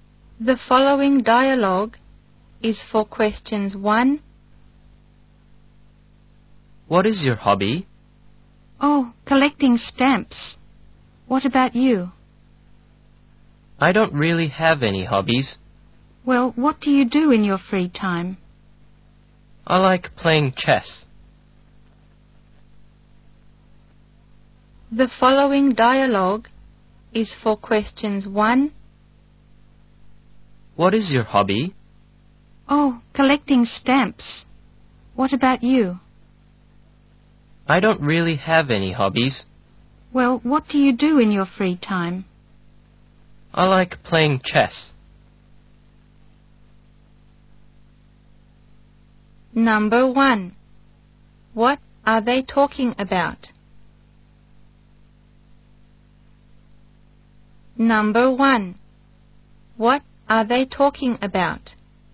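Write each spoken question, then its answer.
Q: What are they talking about?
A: Their hobbies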